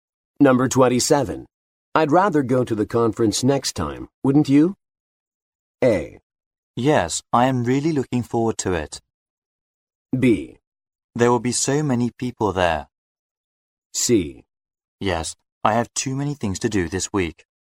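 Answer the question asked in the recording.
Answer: C: Yes, I have too many things to do this week.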